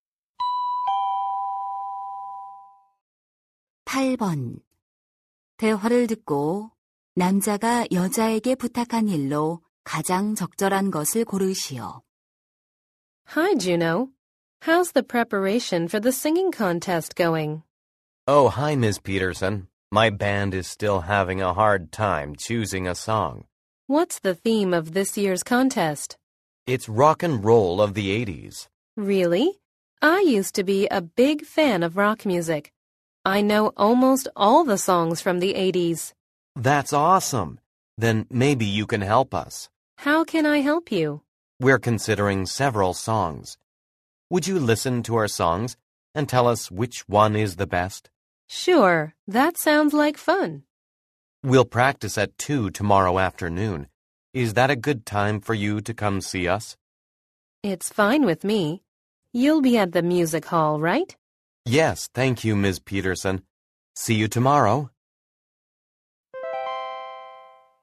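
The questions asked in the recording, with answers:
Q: 대화를 듣고 남자가 여자에게 부탁한 일로 가장 적절한 것을 고르시오.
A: 밴드의 노래를 듣고 가장 좋은 곡을 골라 주기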